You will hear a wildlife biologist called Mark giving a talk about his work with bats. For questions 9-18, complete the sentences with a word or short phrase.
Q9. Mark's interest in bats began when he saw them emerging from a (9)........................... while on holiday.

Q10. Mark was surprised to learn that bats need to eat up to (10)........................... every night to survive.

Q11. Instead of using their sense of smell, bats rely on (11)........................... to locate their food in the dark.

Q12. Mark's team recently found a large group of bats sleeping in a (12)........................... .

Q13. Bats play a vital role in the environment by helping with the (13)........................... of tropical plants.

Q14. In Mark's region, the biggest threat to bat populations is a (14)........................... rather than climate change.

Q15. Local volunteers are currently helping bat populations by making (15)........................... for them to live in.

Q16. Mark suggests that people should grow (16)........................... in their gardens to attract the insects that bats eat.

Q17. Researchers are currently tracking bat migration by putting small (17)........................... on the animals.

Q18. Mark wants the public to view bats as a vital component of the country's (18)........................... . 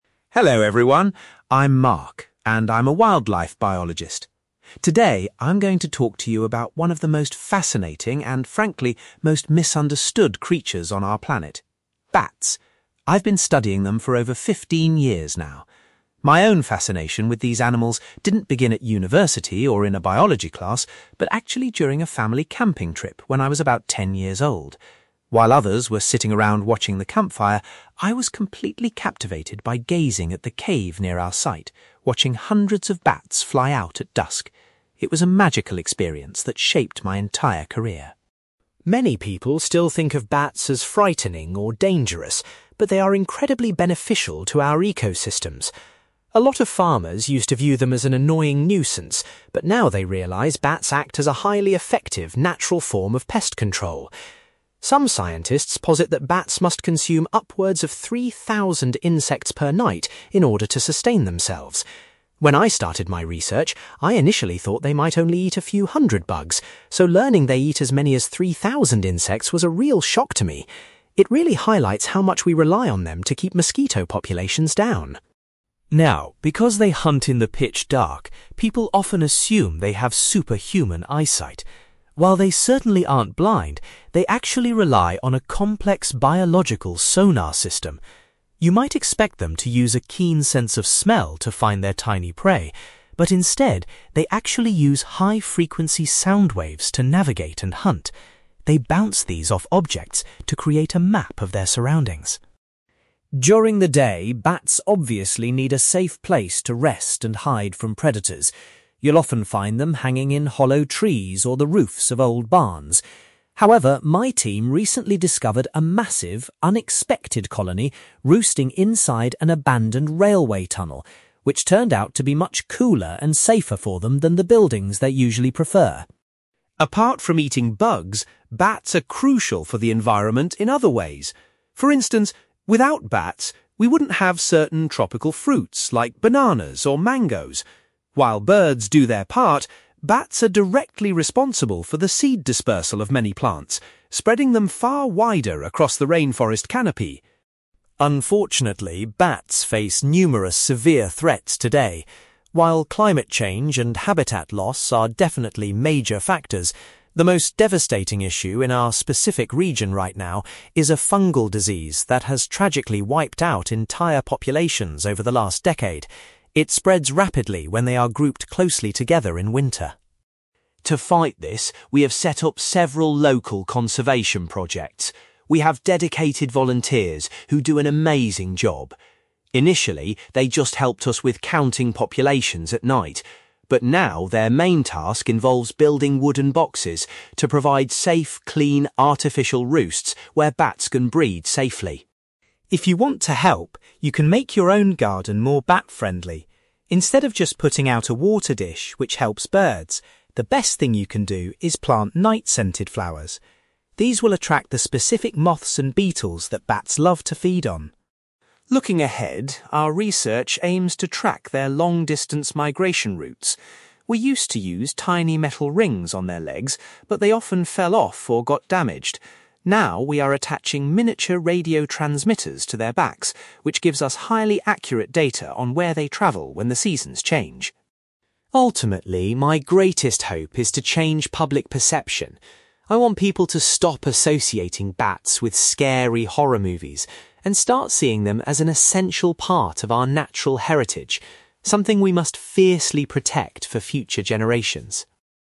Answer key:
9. cave
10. 3,000 insects
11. sound waves
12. railway tunnel
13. seed dispersal
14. disease
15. wooden boxes
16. night-scented flowers
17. radio transmitters
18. natural heritage

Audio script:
Mark: Hello everyone, I'm Mark and I'm a wildlife biologist. Today, I'm going to talk to you about one of the most fascinating and, frankly, most misunderstood creatures on our planet: bats. I've been studying them for over fifteen years now. My own fascination with these animals didn't begin at university or in a biology class, but actually during a family camping trip when I was about ten years old. While others were sitting around watching the campfire, I was completely captivated by gazing at the cave near our site, watching hundreds of bats fly out at dusk. It was a magical experience that shaped my entire career.
Many people still think of bats as frightening or dangerous, but they are incredibly beneficial to our ecosystems. A lot of farmers used to view them as an annoying nuisance, but now they realise bats act as a highly effective, natural form of pest control. Some scientists posit that bats must consume upwards of 3,000 insects per night in order to sustain themselves. When I started my research, I initially thought they might only eat a few hundred bugs, so learning they eat as many as 3,000 insects was a real shock to me! It really highlights how much we rely on them to keep mosquito populations down.
Now, because they hunt in the pitch dark, people often assume they have superhuman eyesight. While they certainly aren't blind, they actually rely on a complex biological sonar system. You might expect them to use a keen sense of smell to find their tiny prey, but instead, they actually use high-frequency sound waves to navigate and hunt. They bounce these off objects to create a map of their surroundings.
During the day, bats obviously need a safe place to rest and hide from predators. You'll often find them hanging in hollow trees or the roofs of old barns. However, my team recently discovered a massive, unexpected colony roosting inside an abandoned railway tunnel, which turned out to be much cooler and safer for them than the buildings they usually prefer.
Apart from eating bugs, bats are crucial for the environment in other ways. For instance, without bats, we wouldn't have certain tropical fruits like bananas or mangoes. While birds do their part, bats are directly responsible for the seed dispersal of many plants, spreading them far wider across the rainforest canopy.
Unfortunately, bats face numerous severe threats today. While climate change and habitat loss are definitely major factors, the most devastating issue in our specific region right now is a fungal disease that has tragically wiped out entire populations over the last decade. It spreads rapidly when they are grouped closely together in winter.
To fight this, we have set up several local conservation projects. We have dedicated volunteers who do an amazing job. Initially, they just helped us with counting populations at night, but now their main task involves building wooden boxes to provide safe, clean artificial roosts where bats can breed safely.
If you want to help, you can make your own garden more bat-friendly. Instead of just putting out a water dish, which helps birds, the best thing you can do is plant night-scented flowers. These will attract the specific moths and beetles that bats love to feed on.
Looking ahead, our research aims to track their long-distance migration routes. We used to use tiny metal rings on their legs, but they often fell off or got damaged. Now, we are attaching miniature radio transmitters to their backs, which gives us highly accurate data on where they travel when the seasons change.
Ultimately, my greatest hope is to change public perception. I want people to stop associating bats with scary horror movies and start seeing them as an essential part of our natural heritage, something we must fiercely protect for future generations.

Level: B2